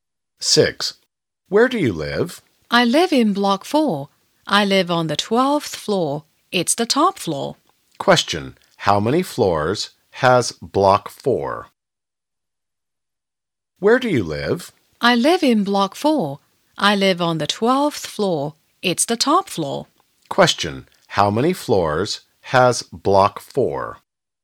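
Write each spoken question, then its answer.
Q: How many floors has block 4?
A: 12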